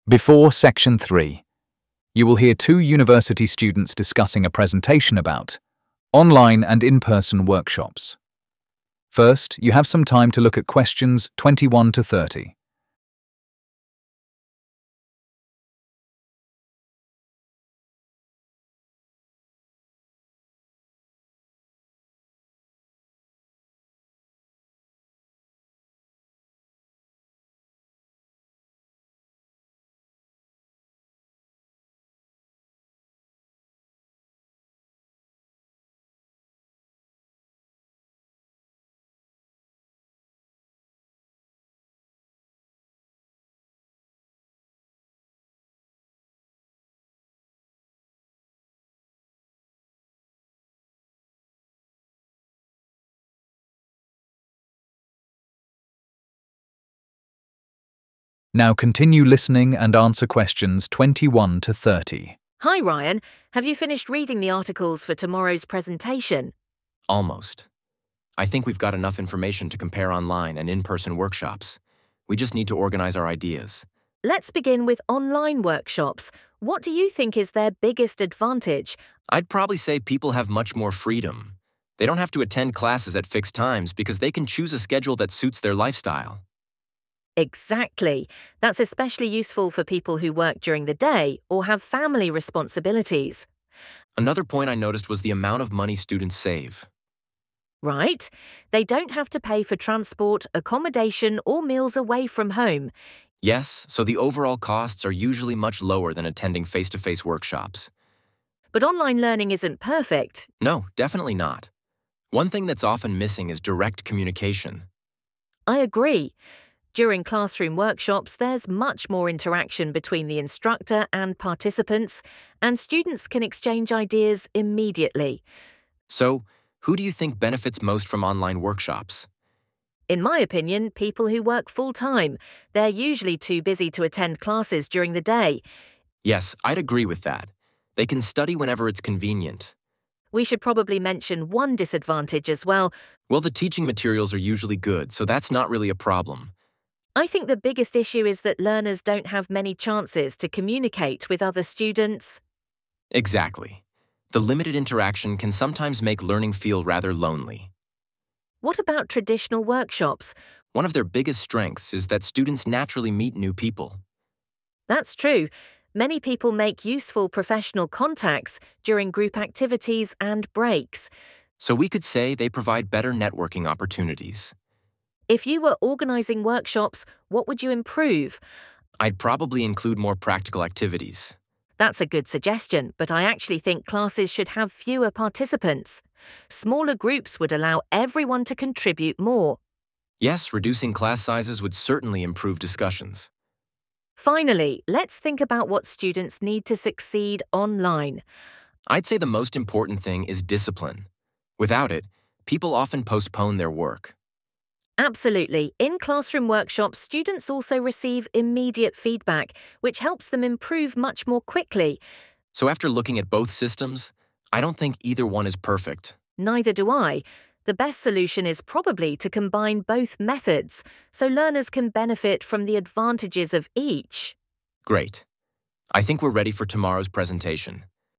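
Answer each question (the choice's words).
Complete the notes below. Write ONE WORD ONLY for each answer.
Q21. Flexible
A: schedule

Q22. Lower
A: costs

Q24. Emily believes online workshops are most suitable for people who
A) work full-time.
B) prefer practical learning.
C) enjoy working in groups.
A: work full-time.

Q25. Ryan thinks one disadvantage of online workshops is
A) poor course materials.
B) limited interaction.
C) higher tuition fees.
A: limited interaction.

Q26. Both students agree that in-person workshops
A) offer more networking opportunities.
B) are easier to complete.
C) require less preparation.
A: offer more networking opportunities.

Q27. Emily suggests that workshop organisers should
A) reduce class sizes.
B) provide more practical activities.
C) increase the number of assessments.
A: reduce class sizes.

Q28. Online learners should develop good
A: discipline

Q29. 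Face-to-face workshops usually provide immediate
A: feedback

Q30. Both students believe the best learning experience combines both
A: methods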